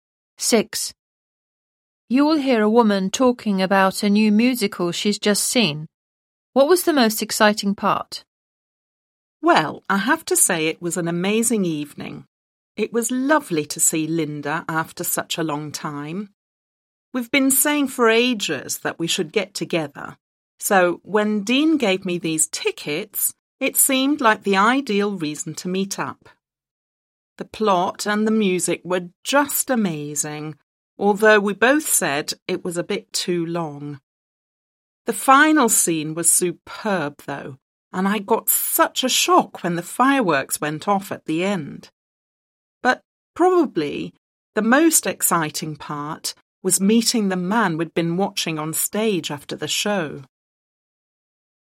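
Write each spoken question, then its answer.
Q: What was the most exciting part?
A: Meeting the actor after the show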